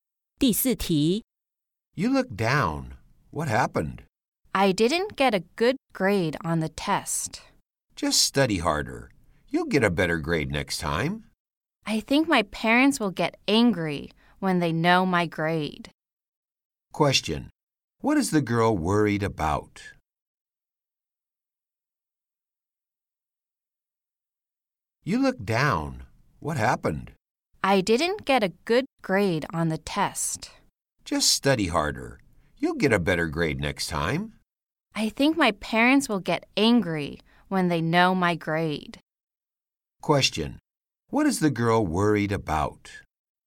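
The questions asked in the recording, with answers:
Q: What is the girl worried about?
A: That her parents will get angry about her bad grade.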